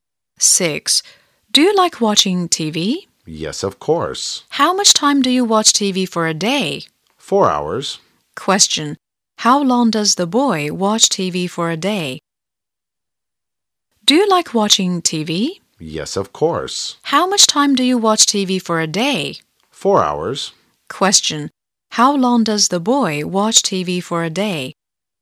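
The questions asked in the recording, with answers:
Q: How long does the boy watch TV for a day?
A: 4 hours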